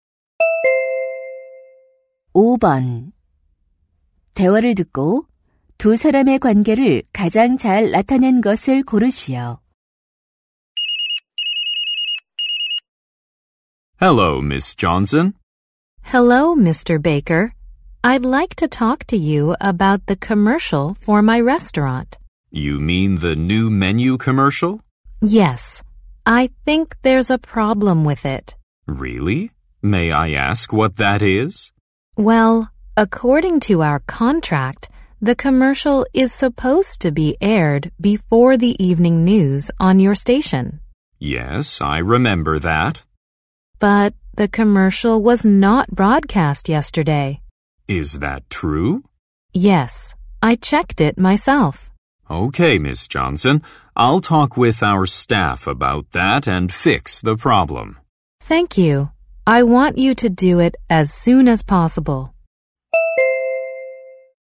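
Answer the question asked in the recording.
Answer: 식당 주인 - 방송국 광고 담당자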